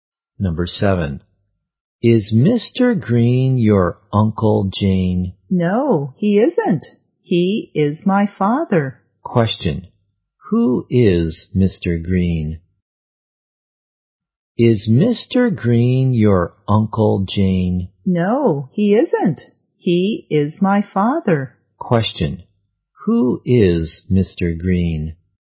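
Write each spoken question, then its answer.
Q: Question, who is Mr. Green?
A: Jane's father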